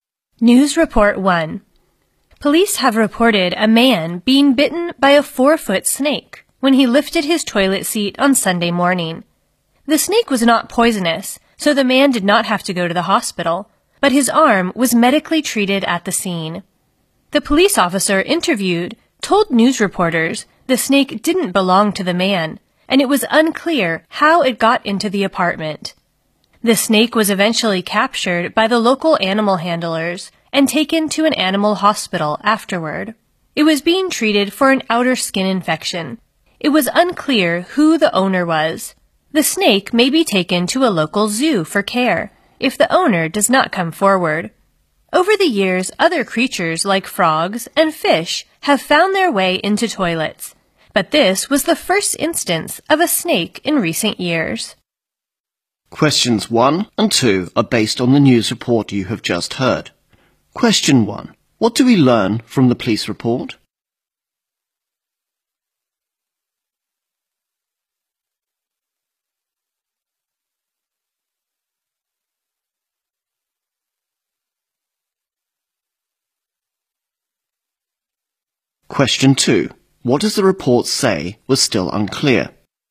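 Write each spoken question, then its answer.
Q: What do we learn from the police report?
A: A man was bitten by a snake when he lifted his toilet seat.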